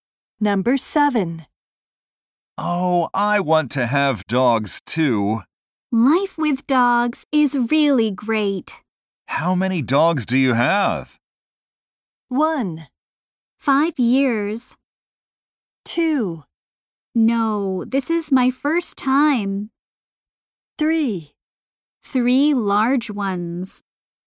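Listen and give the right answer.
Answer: 3: 3 large ones.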